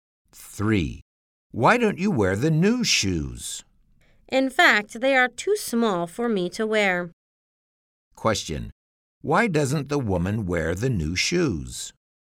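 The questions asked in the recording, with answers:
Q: Why doesn't the woman wear the new shoes?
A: They are too small for her.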